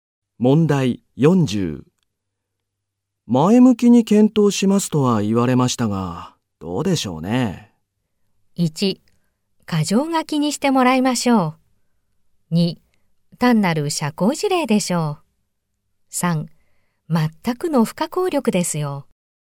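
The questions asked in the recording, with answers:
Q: 前向きに検討しますとは言われましたが、どうでしょうね。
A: 2: 単なる社交辞令でしょう。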